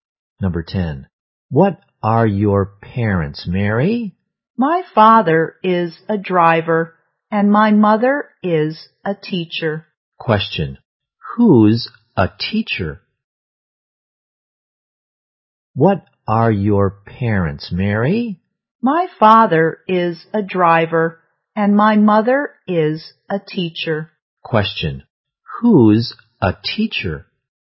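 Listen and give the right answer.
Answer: Mary's mother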